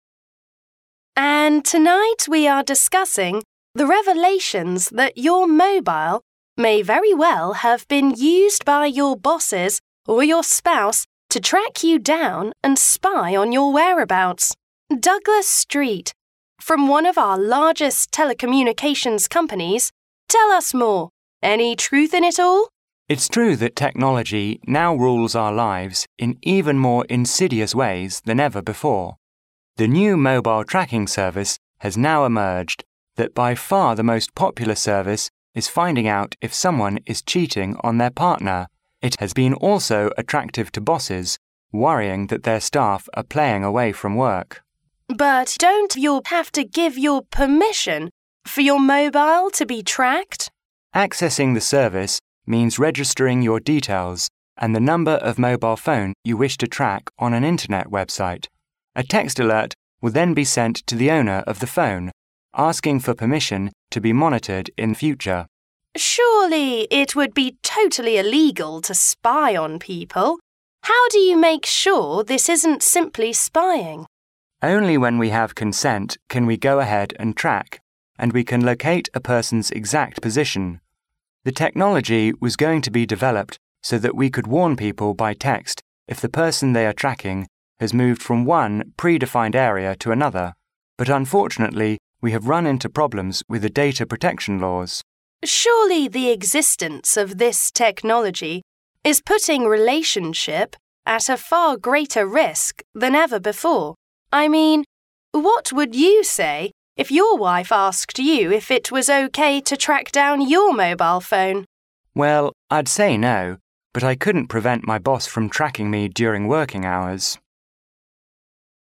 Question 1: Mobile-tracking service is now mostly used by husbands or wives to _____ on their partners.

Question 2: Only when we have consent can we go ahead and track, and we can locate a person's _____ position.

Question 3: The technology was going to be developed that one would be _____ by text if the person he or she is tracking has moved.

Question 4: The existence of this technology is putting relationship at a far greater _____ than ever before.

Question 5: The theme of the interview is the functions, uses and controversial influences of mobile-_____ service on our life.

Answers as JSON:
{"1": "spy", "2": "exact", "3": "warned", "4": "risk", "5": "tracking"}

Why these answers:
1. 访谈中Douglas Street提到新的手机追踪技术已经出现,目前该项服务在调查配偶是否出轨的人群中和需要监督员工是否在岗的老板中最受欢迎,故答案为spy。
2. 在回答该技术是否具有秘密监视的性质时,Douglas说只要得到同意,就可以对一个人所处的位置进行准确定位。故答案为exact。
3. Douglas指出该技术的发展方向是在追踪对象离开某区域范围内就向监控者发出警告。故答案为warned。
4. 主持人提到该技术的应用会对人们的关系带来很多风险,故答案为risk。
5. 结合整段录音内容可知,访谈既提到了手机追踪技术的性能和用途又涉及了其颇具争议性的方面,故答案为tracking。

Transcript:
W: And tonight we are discussing the revelations that your mobile may very well have been used by your bosses or your spouse to track you down and spy on your whereabouts. Douglas Street, from one of our largest telecommunications companies, tell us more. Any truth in it all?
M: It's true that technology now rules our lives in even more insidious ways than ever before. The new mobile-tracking service has now emerged that by far the most popular service is finding out if someone is cheating on their partner. It has been also attractive to bosses, worrying that their staff are playing away from work!
W: But don't you have to give your permission for your mobile to be tracked?
M: Accessing the service means registering your details and the number of mobile phone you wish to track on an internet website. A text alert will then be sent to the owner of the phone, asking for permission to be monitored in future.
W: Surely it would be totally illegal to spy on people ... how do you make sure this isn't simply spying?
W: Only when we have consent can we go ahead and track, and we can locate a person's exact position. The technology was going to be developed so that we could warn people by text if the person they are tracking has moved from one pre-defined area to another ... but unfortunately we have run into problems with the Data Protection Laws.
W: Surely the existence of this technology is putting relationship at a far greater risk than ever before ... I mean, what would you say if your wife asked you if it was OK to track down your mobile phone?
M: Well, I'd say no ... but I couldn't prevent my boss from tracking me during working hours.